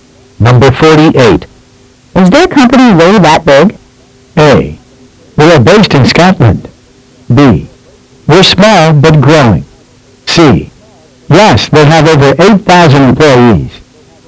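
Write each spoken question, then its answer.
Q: Is their company really that big?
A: C: Yes, they have over 8,000 employees.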